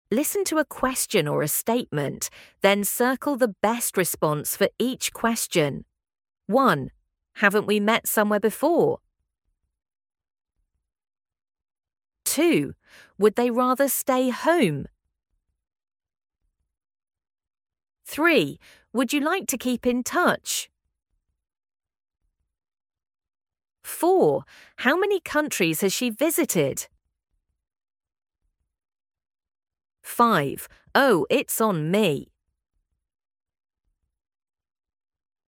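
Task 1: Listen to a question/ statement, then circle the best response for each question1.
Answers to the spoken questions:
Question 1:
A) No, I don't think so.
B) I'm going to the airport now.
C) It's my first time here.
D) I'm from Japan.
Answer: A) No, I don't think so.
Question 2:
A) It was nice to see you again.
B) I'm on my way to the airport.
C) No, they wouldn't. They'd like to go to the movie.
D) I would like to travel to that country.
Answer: C) No, they wouldn't. They'd like to go to the movie.
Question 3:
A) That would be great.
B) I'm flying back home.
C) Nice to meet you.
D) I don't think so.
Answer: A) That would be great.
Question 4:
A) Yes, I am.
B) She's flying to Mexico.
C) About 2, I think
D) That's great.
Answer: C) About 2, I think
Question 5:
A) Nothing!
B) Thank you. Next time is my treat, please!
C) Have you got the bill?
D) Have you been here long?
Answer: B) Thank you. 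Next time is my treat, please!

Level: A2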